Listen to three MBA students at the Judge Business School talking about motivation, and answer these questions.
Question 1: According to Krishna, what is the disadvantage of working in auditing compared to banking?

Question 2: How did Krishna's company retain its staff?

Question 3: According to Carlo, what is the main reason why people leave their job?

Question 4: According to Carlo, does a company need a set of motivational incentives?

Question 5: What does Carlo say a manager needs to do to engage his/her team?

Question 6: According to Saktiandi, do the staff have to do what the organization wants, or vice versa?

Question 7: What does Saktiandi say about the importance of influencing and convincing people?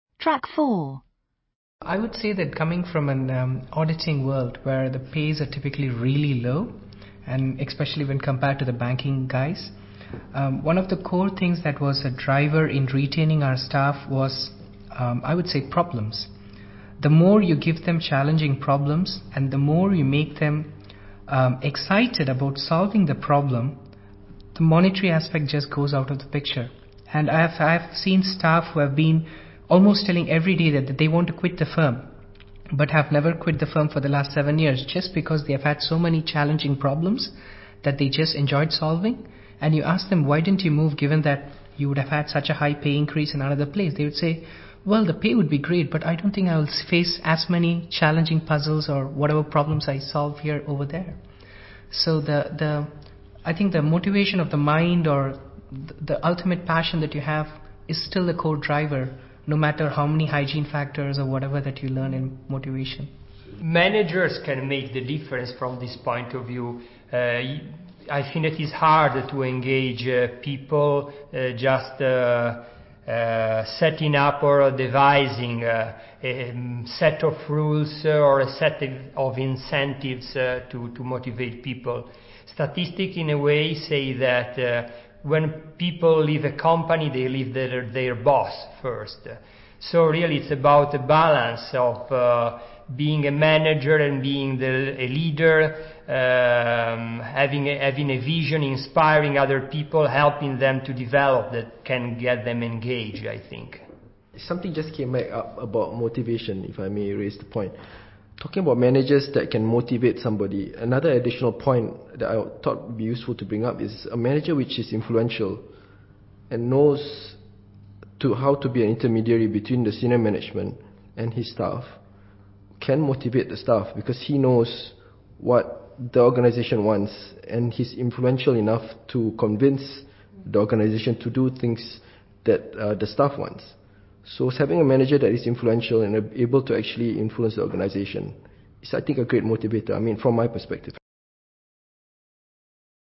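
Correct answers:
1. The pay is typically really low.
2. By giving them challenging problems that they enjoyed solving.
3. They leave their boss first.
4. No, it is hard to engage people just by setting up rules or incentives.
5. Balance being a manager and a leader: have a vision, inspire people and help them develop.
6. Vice versa: an influential manager convinces the organization to do what the staff want.
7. A manager who can influence the organization is a great motivator.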